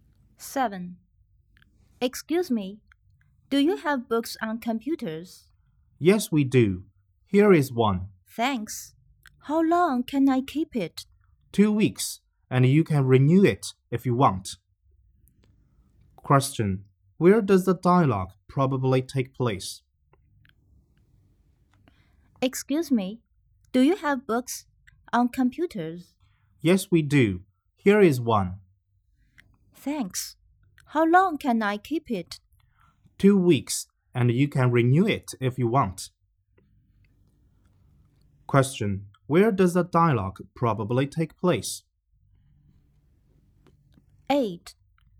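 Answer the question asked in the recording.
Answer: In a library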